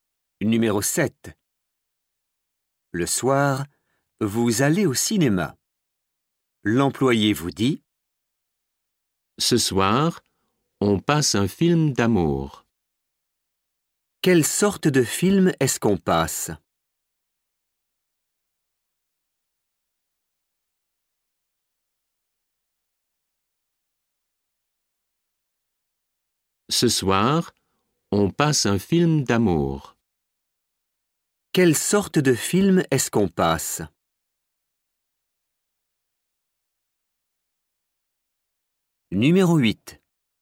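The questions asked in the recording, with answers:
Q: Quelle sorte de film est-ce qu'on passe?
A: un film d'amour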